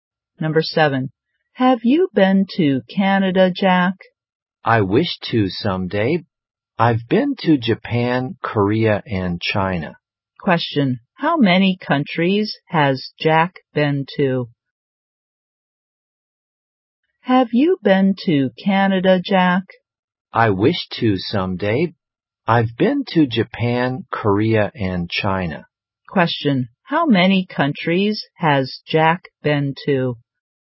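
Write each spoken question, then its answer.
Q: how many countries has Jack been to?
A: Three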